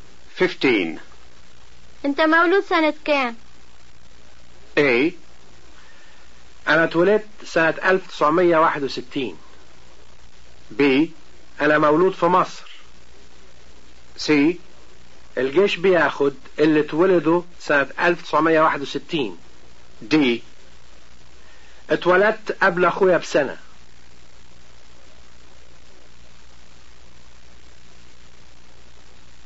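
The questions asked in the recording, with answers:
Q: انت مولود سنة كام؟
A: A: انا اتولدت سنة 1961.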